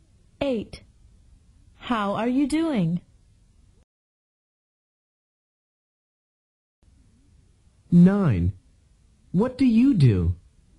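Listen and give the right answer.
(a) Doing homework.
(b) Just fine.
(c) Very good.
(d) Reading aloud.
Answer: (b) Just fine.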